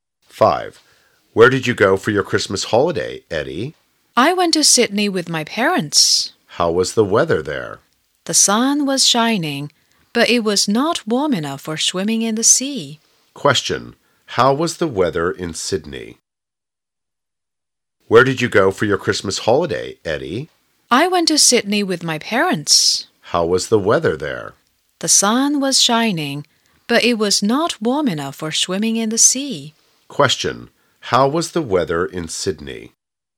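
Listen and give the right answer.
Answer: Sunny but not warm enough for swimming in the sea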